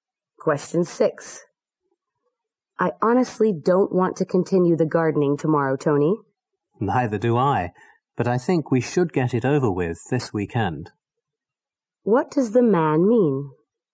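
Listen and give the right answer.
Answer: They should finish the gardening this weekend.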